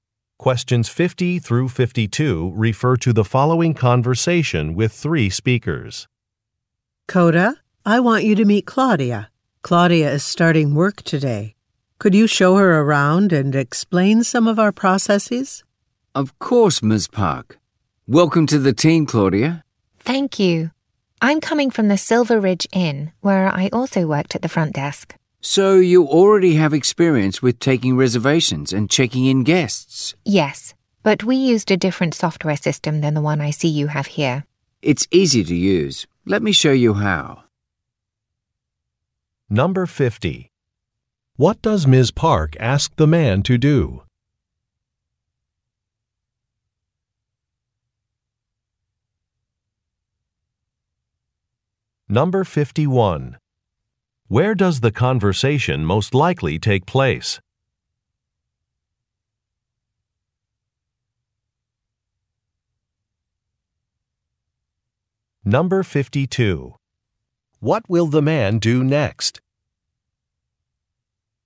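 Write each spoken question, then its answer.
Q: What does Ms. Park ask the man to do?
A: Show Claudia around and explain processes

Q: Where does the conversation most likely take place?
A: At a hotel

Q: What will the man do next?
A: Show her how to use the software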